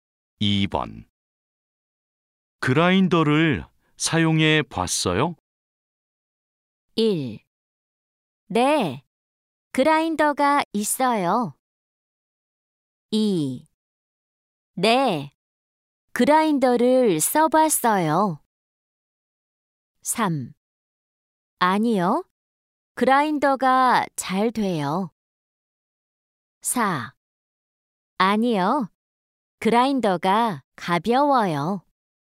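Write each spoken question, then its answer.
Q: 그라인더를 사용해 봤어요?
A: 2: 네, 그라인더를 써봤어요.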